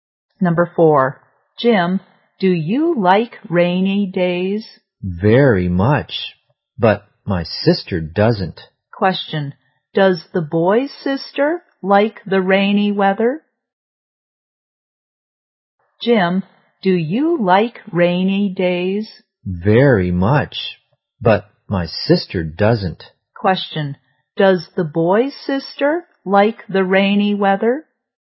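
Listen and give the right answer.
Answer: No, she doesn't.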